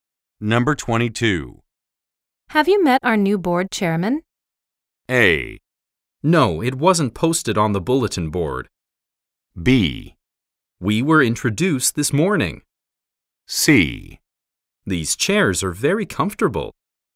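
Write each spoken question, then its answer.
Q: Have you met our new board chairman?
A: B: We were introduced this morning.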